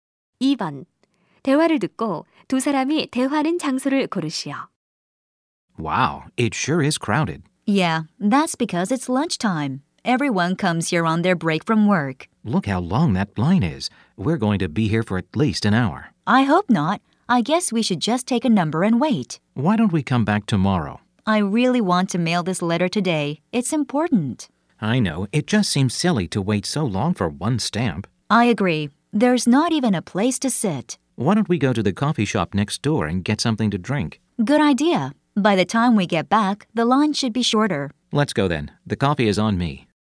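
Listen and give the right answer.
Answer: 우체국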